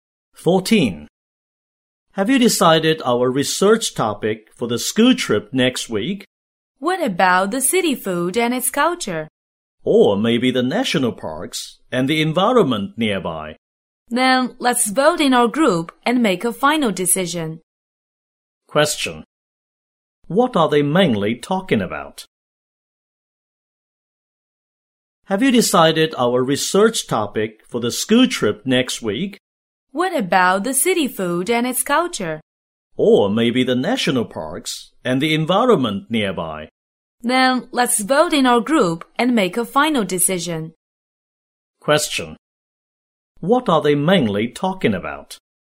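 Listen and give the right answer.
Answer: Their research topic for the school trip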